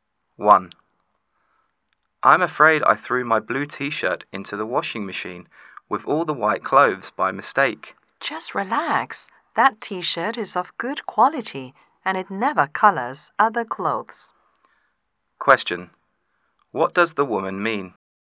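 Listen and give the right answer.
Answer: The T-shirt won't stain the white clothes, so there is no need to worry.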